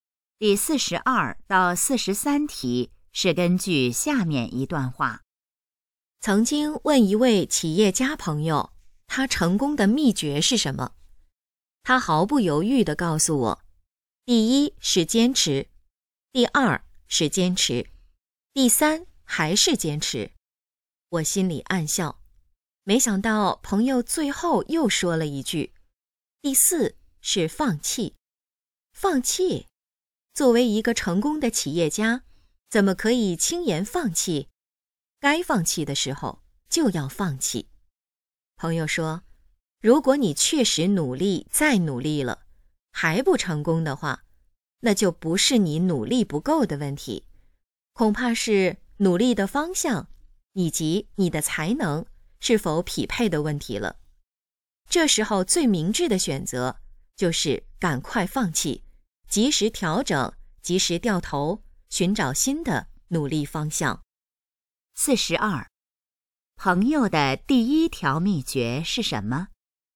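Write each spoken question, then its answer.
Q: 朋友的第一条秘诀是什么?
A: 坚持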